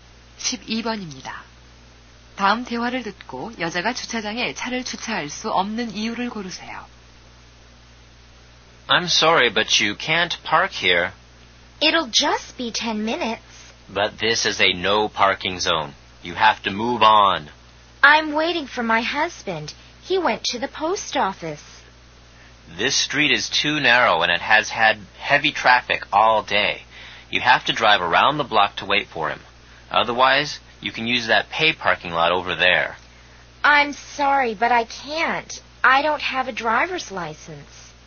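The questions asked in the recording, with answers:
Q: 다음 대화를 듣고 여자가 주차장에 차를 주차할 수 없는 이유를 고르세요.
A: 운전면허증이 없어서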